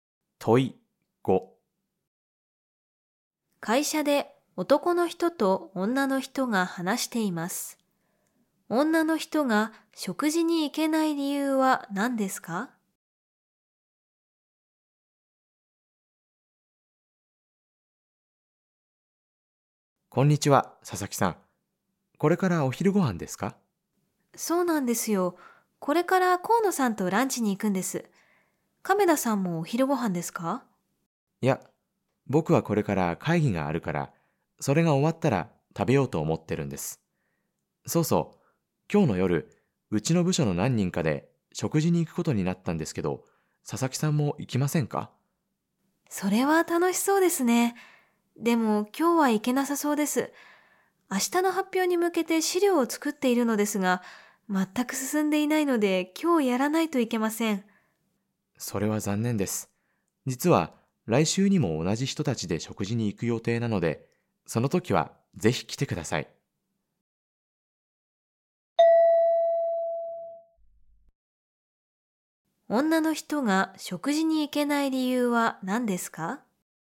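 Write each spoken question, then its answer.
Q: 女の人が食事に行けない理由は何ですか?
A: 明日の発表の資料を今日作らないといけないから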